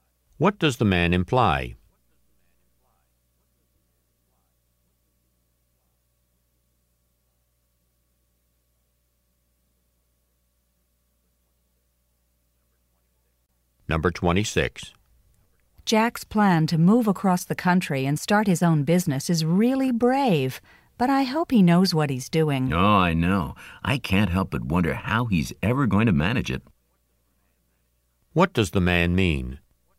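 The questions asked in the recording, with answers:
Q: What does the man mean?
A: He also doubts Jack can manage it.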